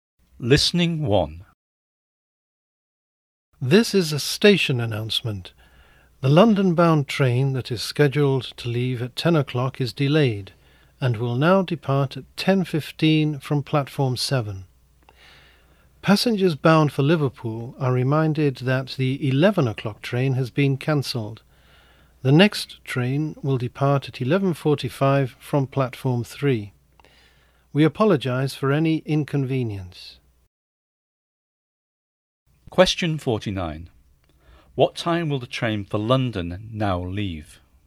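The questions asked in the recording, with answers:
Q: What time will the train for London now leave?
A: 10:15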